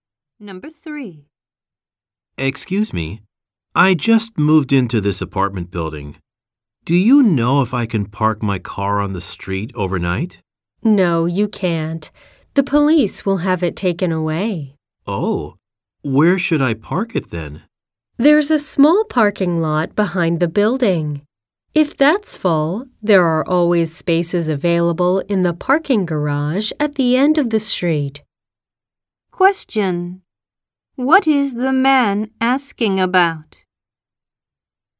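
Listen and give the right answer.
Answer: Where he can park his car overnight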